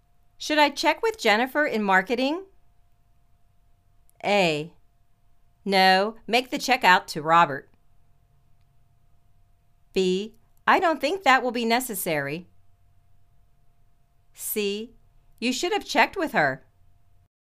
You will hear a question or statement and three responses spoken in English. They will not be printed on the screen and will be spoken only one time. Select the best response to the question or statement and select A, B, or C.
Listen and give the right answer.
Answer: I don't think that will be necessary.